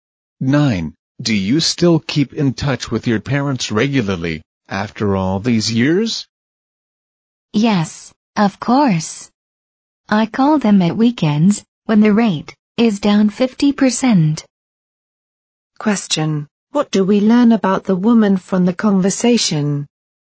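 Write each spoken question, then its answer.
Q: What do we learn about the woman from the conversation?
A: She calls her parents at weekends, when calls are cheaper.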